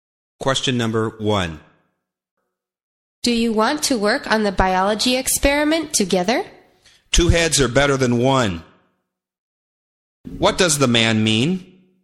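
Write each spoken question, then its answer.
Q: What does the man mean?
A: He wants to work on the experiment together.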